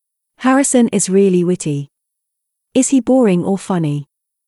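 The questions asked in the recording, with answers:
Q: Is he boring or funny?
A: Funny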